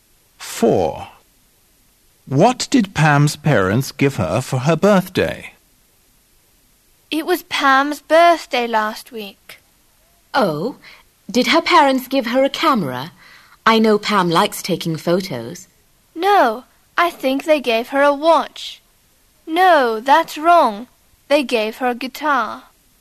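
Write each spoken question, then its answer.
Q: What did Pam's parents give her for her birthday?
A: A guitar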